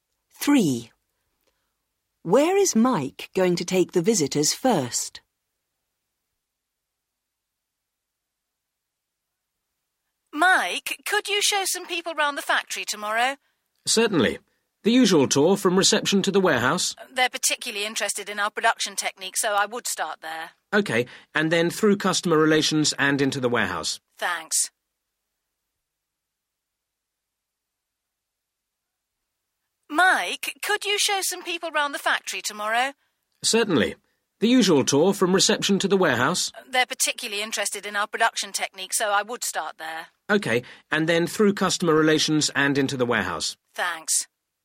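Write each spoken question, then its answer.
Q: Where is Mike going to take the visitors first?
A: production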